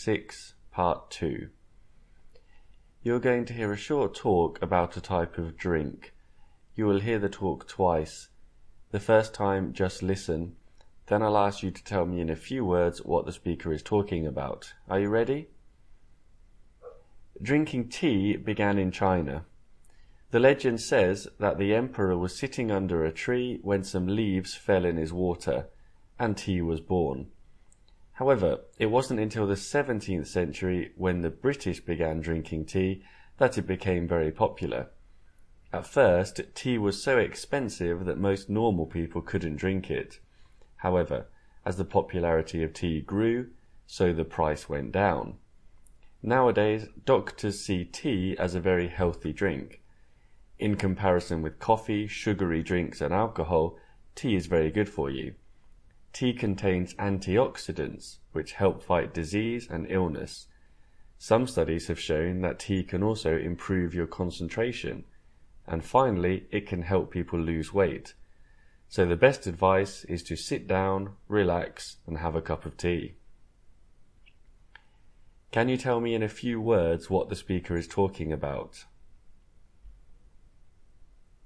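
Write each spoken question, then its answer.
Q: Can you tell me in a few words what the speaker is talking about?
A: Tea: its history and health benefits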